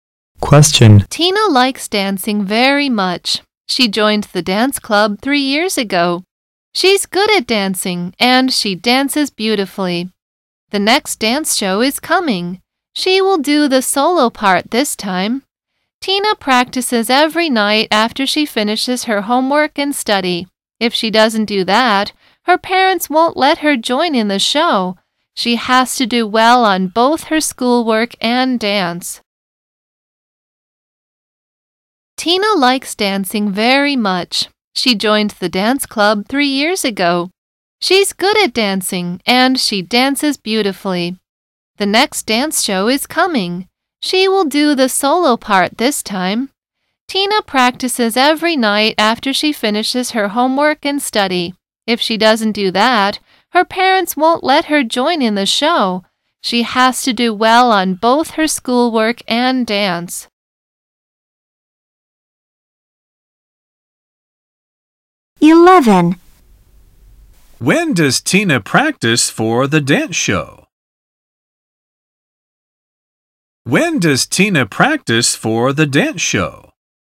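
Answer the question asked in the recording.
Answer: Every night after she finishes her homework and study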